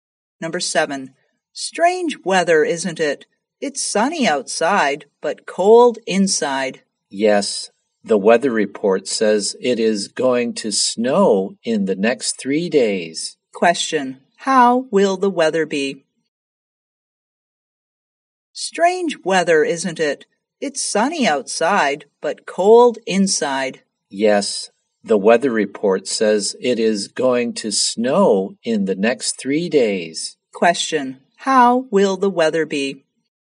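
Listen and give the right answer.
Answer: Snowy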